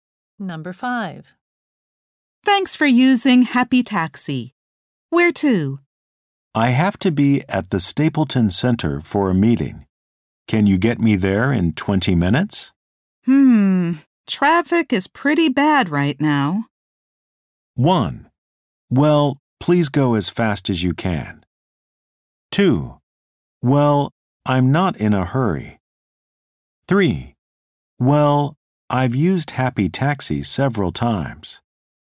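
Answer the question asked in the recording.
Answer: 1: Well, please go as fast as you can.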